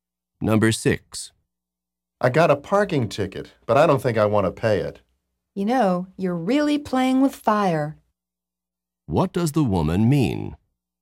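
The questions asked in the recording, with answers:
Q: What does the woman mean?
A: Not paying the ticket is risky.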